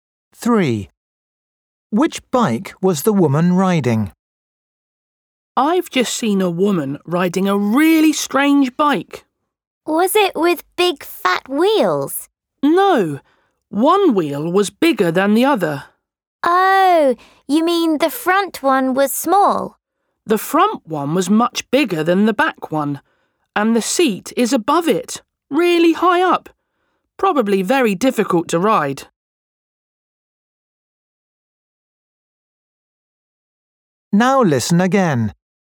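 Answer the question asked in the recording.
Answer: a bike with a much bigger front wheel and a high seat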